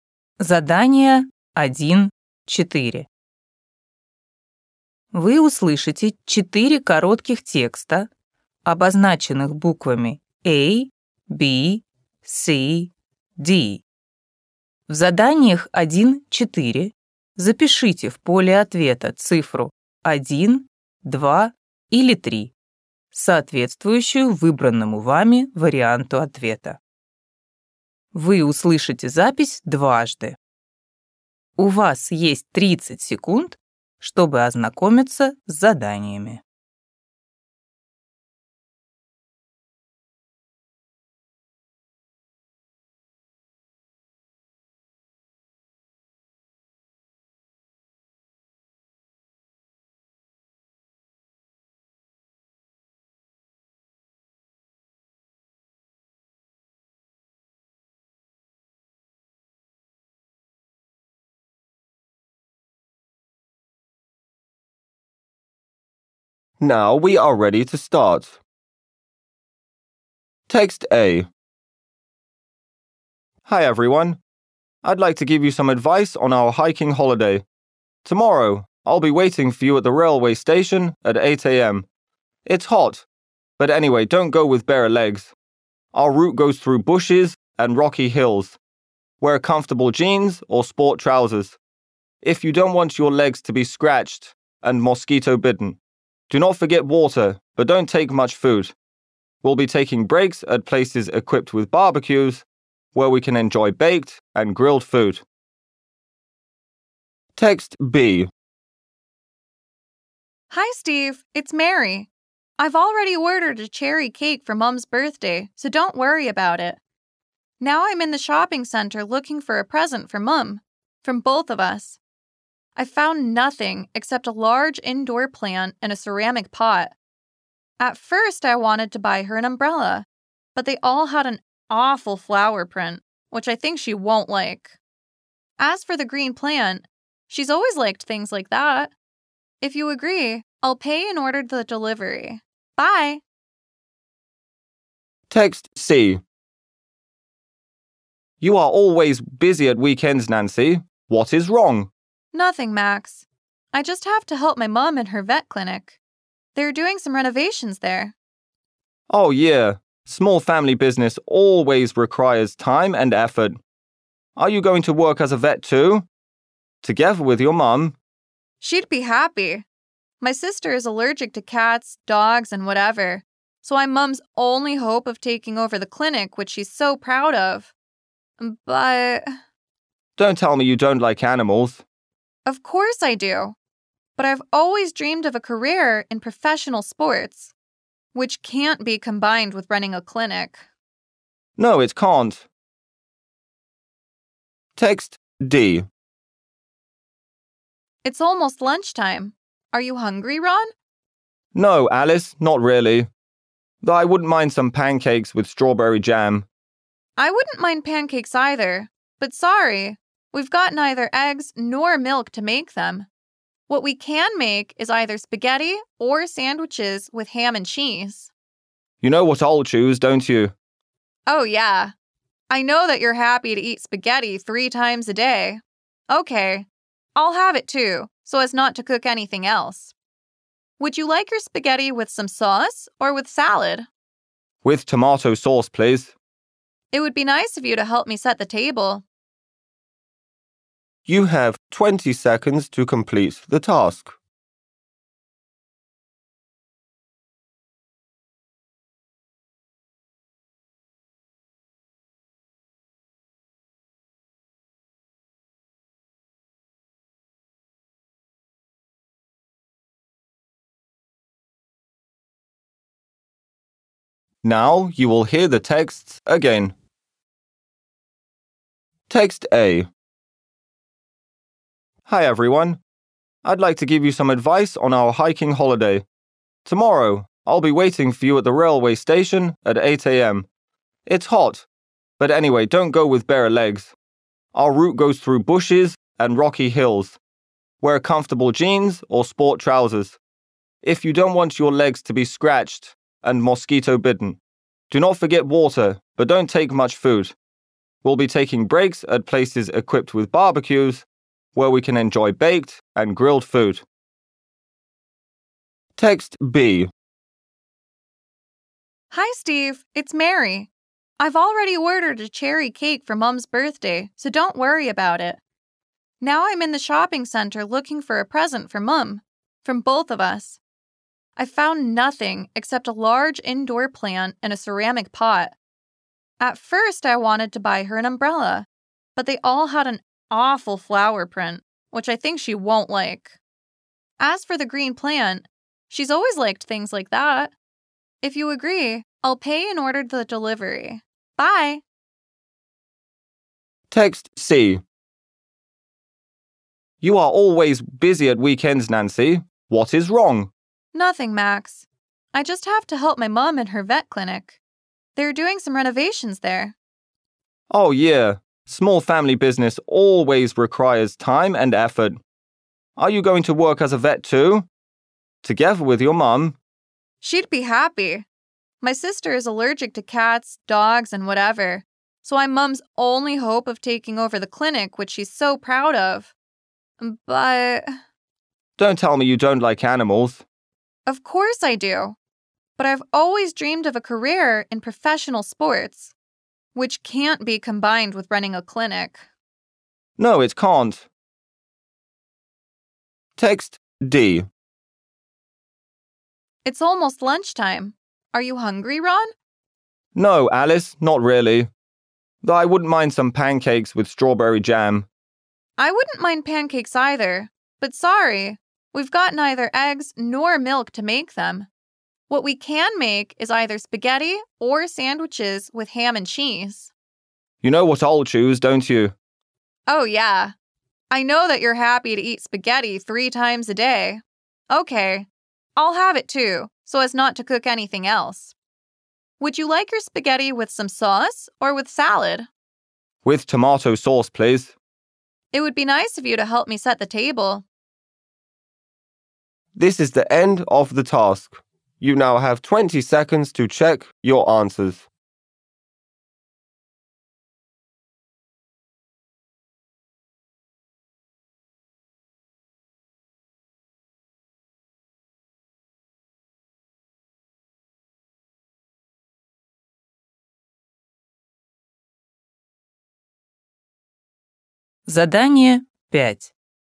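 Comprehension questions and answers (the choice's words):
Вы услышите четыре коротких текста, обозначенных буквами А, B, C, D.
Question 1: The hiking instructor advises the hikers on ...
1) how to cook food on a fire.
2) what to wear on the hiking trip.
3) how to find the way through the forest.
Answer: what to wear on the hiking trip.

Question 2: What present does Mary suggest buying for their mother?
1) A pot plant.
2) An umbrella.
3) A cherry cake.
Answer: A pot plant.

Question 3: Nancy doesn't want to participate in the family business because ...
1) she is allergic to cats.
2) she doesn't like animals.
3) she's chosen another profession.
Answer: she's chosen another profession.

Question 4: What are Alice and Ron going to have for lunch?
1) Pancakes.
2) Spaghetti.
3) Sandwiches.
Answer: Spaghetti.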